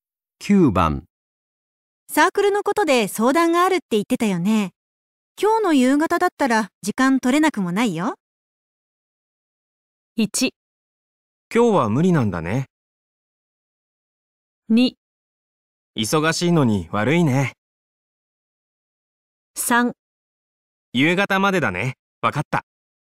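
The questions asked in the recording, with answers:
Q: サークルのことで相談があるって言ってたよね。今日の夕方だったら時間取れなくもないよ。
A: 2: 忙しいのに悪いね。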